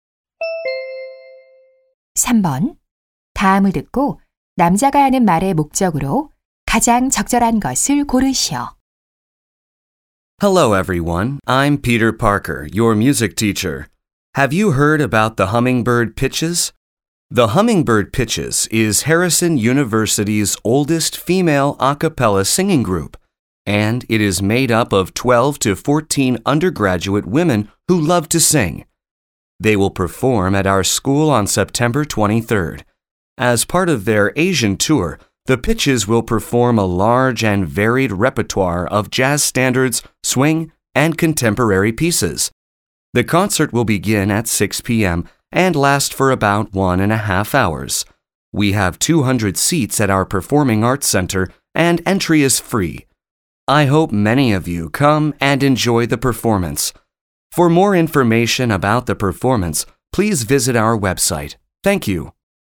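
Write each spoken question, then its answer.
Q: 다음을 듣고 남자가 하는 말의 목적으로 가장 적절한 것을 고르시오.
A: 학교에서 열리는 아카펠라 그룹 공연을 홍보하려고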